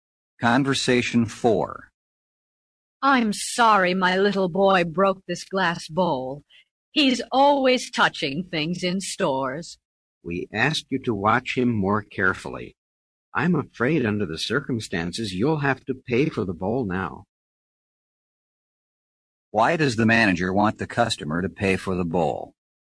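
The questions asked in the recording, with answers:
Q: Why does the manager want the customer to pay for the bowl?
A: Her boy broke it because she didn't watch him carefully as asked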